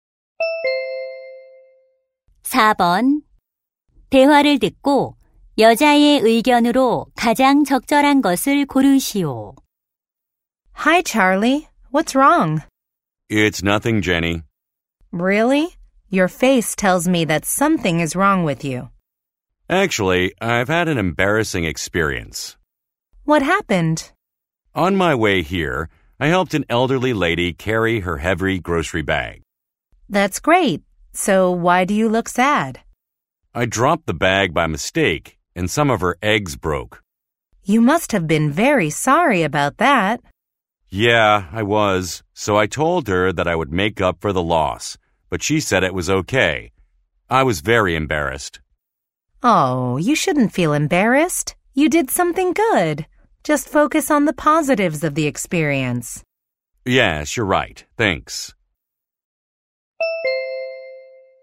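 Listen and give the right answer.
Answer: 경험의 긍정적인 면에 집중해야 한다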